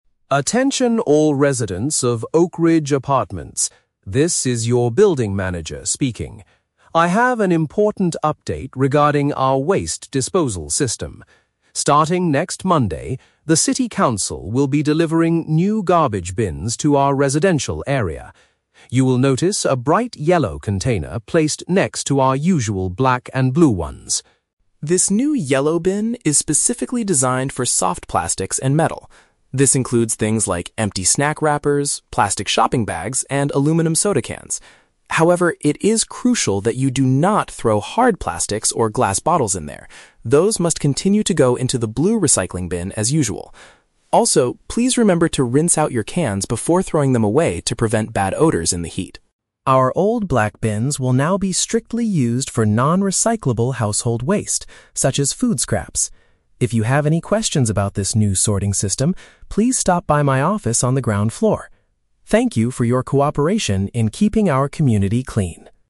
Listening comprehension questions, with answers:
Listen to the public announcement from a building manager, then choose the correct answer (A, B, or C) for each question.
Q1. What is the main purpose of this announcement?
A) To inform residents about a change in the garbage collection schedule.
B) To introduce an additional container for specific recyclable items.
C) To warn people about the terrible smells coming from the trash room.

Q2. Which items belong in the new yellow bin?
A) Solid plastic containers and glass items.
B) Leftover meals and fruit peels.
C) Empty drink cans and flexible plastic bags.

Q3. What does the manager ask the residents to do before disposing of their metal items?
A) Clean them with water.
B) Crush them to save space.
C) Bring them to the office on the ground floor.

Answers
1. B) To introduce an additional container for specific recyclable items.
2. C) Empty drink cans and flexible plastic bags.
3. A) Clean them with water.

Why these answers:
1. The manager announces that the city is delivering new bins and introduces a "bright yellow container" specifically designed for soft plastics and metal. Option (B) is a paraphrase of this main idea. Option (A) is a trap; "next Monday" is when the bins arrive, but the collection schedule is not discussed. Option (C) is a trap; "bad odors" are mentioned as a reason to wash cans, not the main reason for the announcement.
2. The manager says the yellow bin is for things like "plastic shopping bags, and aluminum soda cans". Option (C) uses paraphrases ("flexible plastic bags" for shopping bags, "empty drink cans" for soda cans). Option (A) is a trap; the manager explicitly warns: "do not throw hard plastics or glass bottles in there" (they go in the blue bin). Option (B) is a trap; "food scraps" (leftovers) go in the black bin.
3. The manager asks residents to "rinse out your cans." "Rinse out" means to wash or clean with water. Option (A) is a paraphrase. Option (C) is a trap; the manager mentions the "office on the ground floor" for asking questions, not for dropping off trash. Option (B) is a plausible real-life action but is never mentioned in the audio.

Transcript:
Building Manager: Attention all residents of Oakridge Apartments. This is your building manager speaking. I have an important update regarding our waste disposal system. Starting next Monday, the city council will be delivering new garbage bins to our residential area. You will notice a bright yellow container placed next to our usual black and blue ones.
This new yellow bin is specifically designed for soft plastics and metal. This includes things like empty snack wrappers, plastic shopping bags, and aluminum soda cans. However, it is crucial that you do not throw hard plastics or glass bottles in there; those must continue to go into the blue recycling bin as usual. Also, please remember to rinse out your cans before throwing them away to prevent bad odors in the heat.
Our old black bins will now be strictly used for non-recyclable household waste, such as food scraps. If you have any questions about this new sorting system, please stop by my office on the ground floor. Thank you for your cooperation in keeping our community clean!

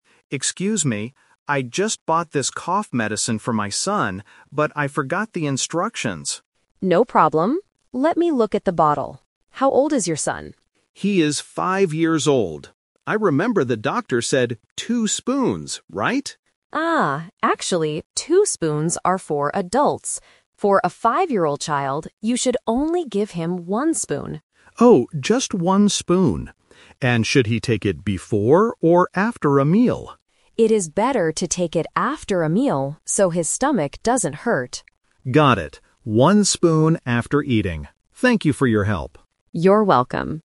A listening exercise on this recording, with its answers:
Listen to the conversation between a patient and a pharmacist. Choose the correct answer (A, B, or C) for each question.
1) Who is the medicine for?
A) The patient's five-year-old son.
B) The patient's husband.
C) The pharmacist.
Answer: A) The patient's five-year-old son.

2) How much medicine should the boy take?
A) Two spoons.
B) One spoon.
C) Three spoons.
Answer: B) One spoon.

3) When should the boy take the medicine?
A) Right before going to sleep.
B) Before eating a meal.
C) After eating a meal.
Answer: C) After eating a meal.

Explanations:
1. The patient explicitly says, "I just bought this cough medicine for my son... He is five years old." Trap B is wrong: An adult is mentioned when talking about the dosage ("two spoons are for adults"), but the medicine is for the son. Trap C is wrong: The pharmacist is the one giving advice, not the one taking the medicine.
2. The pharmacist clearly instructs, "For a five-year-old child, you should only give him one spoon." Trap A is wrong (Number Trap & The Twist): The patient thought it was two spoons, but the pharmacist corrects him, saying that two spoons are only for adults. Trap C is wrong: Three spoons is a plausible amount, but it is not mentioned in the audio.
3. The pharmacist says, "It is better to take it after a meal." The patient confirms: "One spoon after eating." Trap A is wrong: Taking medicine before sleep is common, but it is never mentioned in this conversation. Trap B is wrong: The patient asks if it is "before or after a meal", but "before" is the wrong option.

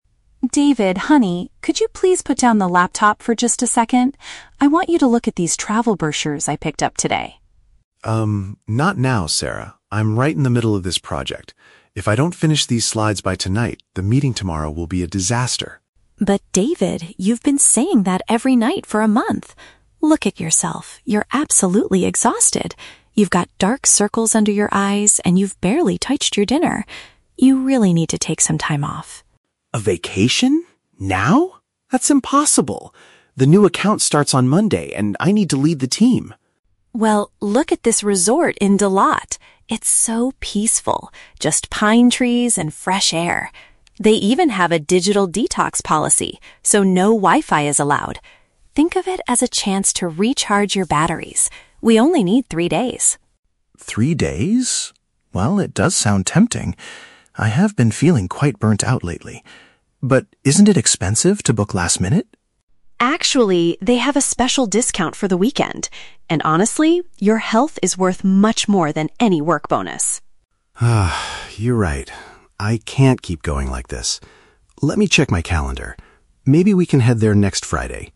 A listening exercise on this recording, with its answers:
Listen to the conversation between a wife (Sarah) and her husband (David) and choose the correct answer (A, B, or C).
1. Why is Sarah trying to persuade David to go on a trip?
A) Because she already booked a luxury resort in Da Lat.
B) Because she is worried about his health and tiredness.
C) Because she wants him to get a big bonus from his boss.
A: B) Because she is worried about his health and tiredness.

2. What is a special feature of the resort Sarah mentions?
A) It offers high-speed Wi-Fi for people to work remotely.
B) It is located in a crowded city with many activities.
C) It encourages guests to stay away from electronic devices.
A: C) It encourages guests to stay away from electronic devices.

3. What is David's final reaction to Sarah's suggestion?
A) He refuses to go because the new project starts on Monday.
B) He agrees that he needs a break and will check his schedule.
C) He decides to go immediately tonight after finishing his slides.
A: B) He agrees that he needs a break and will check his schedule.

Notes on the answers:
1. Sarah mentions that David looks "exhausted," has "dark circles under his eyes," and hasn't eaten much. She says he needs to "take some time off" for his well-being.
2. Sarah says the resort has a "digital detox" policy where "no Wi-Fi is allowed." This means guests are encouraged to stay off their phones or laptops.
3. At the end, David admits he is "burnt out" and says "Let me check my calendar" to plan for next Friday.

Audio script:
Sarah: David, honey, could you please put down the laptop for just a second? I want you to look at these travel brochures I picked up today.
David: Um, not now, Sarah. I'm right in the middle of this project. If I don't finish these slides by tonight, the meeting tomorrow will be a disaster.
Sarah: But David, you've been saying that every night for a month! Look at yourself, you're absolutely exhausted. You've got dark circles under your eyes and you've barely touched your dinner. You really need to take some time off.
David: A vacation? Now? That's impossible. The new account starts on Monday and I need to lead the team.
Sarah: Well, look at this resort in Da Lat. It's so peaceful—just pine trees and fresh air. They even have a "digital detox" policy, so no Wi-Fi is allowed. Think of it as a chance to recharge your batteries. We only need three days.
well, it does sound tempting. I have been feeling quite burnt out lately. But isn't it expensive to book last minute?
Sarah: Actually, they have a special discount for the weekend. And honestly, your health is worth much more than any work bonus.
David: You're right. I can't keep going like this. Let me check my calendar... maybe we can head there next Friday.

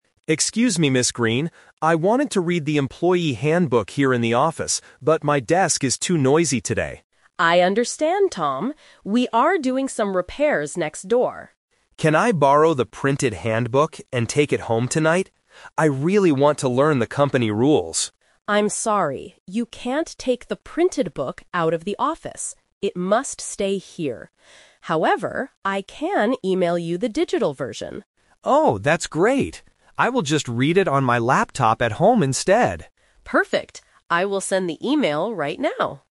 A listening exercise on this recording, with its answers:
Listen to a conversation between a new employee and his manager. Choose the correct answer A, B, or C.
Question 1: Why doesn't Tom read the handbook in the office today?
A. Because he has to go home early.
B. Because his desk is too noisy.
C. Because he does not have a desk.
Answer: B. Because his desk is too noisy.

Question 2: What did Tom originally ask to do?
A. Take the printed book home.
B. Read the book on his laptop.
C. Fix the noise in the office.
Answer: A. Take the printed book home.

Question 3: How will Tom read the company rules tonight?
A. He will read the printed book at home.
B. He will read them at the office tomorrow.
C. He will read them from an email.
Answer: C. He will read them from an email.

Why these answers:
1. Tom says clearly, "my desk is too noisy today." Trap: Option A is plausible (có vẻ hợp lý trong thực tế) but it is not mentioned in the audio. Option C is a trap because the word "desk" is used, but he actually has a desk, it's just noisy.
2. Tom asks, "Can I borrow the printed handbook and take it home tonight?" Trap: Option B is a trap. Reading on the laptop is his final decision, not what he originally asked for. Option C is a trap because the manager mentions "repairs" causing the noise, but Tom doesn't want to fix it.
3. Ms. Green says, "I can email you the digital version," and Tom agrees to read it on his laptop. Trap: Option A is the biggest trap. Tom wanted to take the printed book home, but the manager says "you can't take the printed book out of the office."

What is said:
Green. I wanted to read the employee handbook here in the office, but my desk is too noisy today.
Ms. Green: I understand, Tom. We are doing some repairs next door.
Tom: Can I borrow the printed handbook and take it home tonight? I really want to learn the company rules.
Green: I'm sorry, you can't take the printed book out of the office. It must stay here. However, I can email you the digital version.
Tom: Oh, that's great! I will just read it on my laptop at home instead.

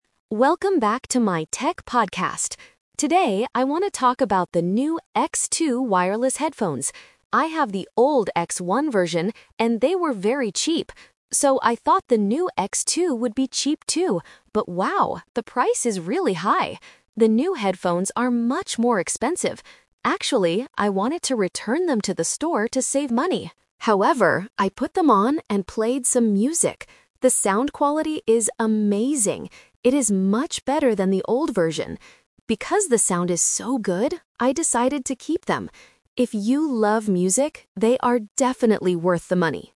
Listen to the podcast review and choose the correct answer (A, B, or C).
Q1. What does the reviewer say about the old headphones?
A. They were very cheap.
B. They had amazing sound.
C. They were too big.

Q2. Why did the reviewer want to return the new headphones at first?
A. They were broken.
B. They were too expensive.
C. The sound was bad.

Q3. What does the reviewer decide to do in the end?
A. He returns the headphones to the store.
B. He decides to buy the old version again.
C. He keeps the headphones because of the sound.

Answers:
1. A. They were very cheap.
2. B. They were too expensive.
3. C. He keeps the headphones because of the sound.

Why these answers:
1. The reviewer is referring to the older version (X1) and explicitly stating that "they were very cheap." Option (B) is a trap because "amazing sound" is a characteristic of the new X2 headphones. Option (C) is a possible conjecture but is not mentioned in the text.
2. The reviewer wants to return the new headphones because "the price is really high" and they are "much more expensive." Option (A) is a reasonable reason for buying them but is not included in the text. Option (C) is a trap, as the sound is actually very good, not bad at all.
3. This sentence uses a "Twist" technique. Initially, the speaker intended to return them to the store to save money. However, after listening to them and finding the sound quality excellent, he changed his mind and decided to keep them. Option (A) is the biggest trap (representing the original intention). Option (B) is completely wrong compared to the actual events.

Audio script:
Reviewer: Welcome back to my tech podcast! Today, I want to talk about the new X2 wireless headphones. I have the old X1 version, and they were very cheap. So, I thought the new X2 would be cheap, too. But wow, the price is really high! The new headphones are much more expensive. Actually, I wanted to return them to the store to save money. However, I put them on and played some music. The sound quality is amazing! It is much better than the old version. Because the sound is so good, I decided to keep them. If you love music, they are definitely worth the money.

